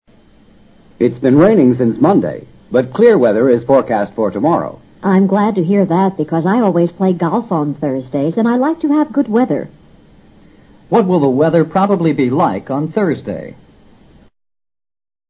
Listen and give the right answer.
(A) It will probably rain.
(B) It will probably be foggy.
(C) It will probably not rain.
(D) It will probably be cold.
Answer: (C) It will probably not rain.

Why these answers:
根据常识可排除A,B两项。下雨、有雾打高尔夫球是不可能的。 clear weather 指晴朗的天气,与气温无关。她所关心的显然也是晴雨问题,而不是冷热的问题。 forecast: 预报。